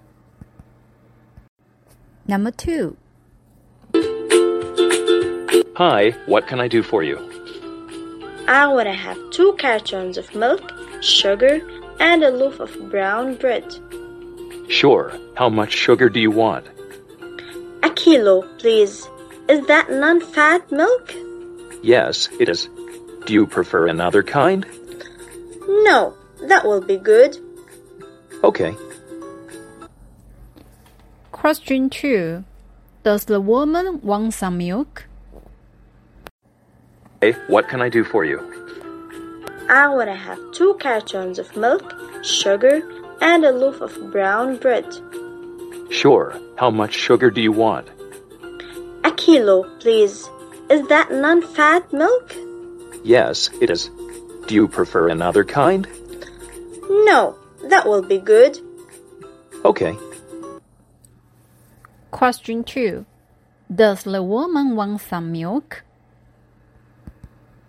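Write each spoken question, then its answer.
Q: Does the woman want some milk?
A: Yes, she does.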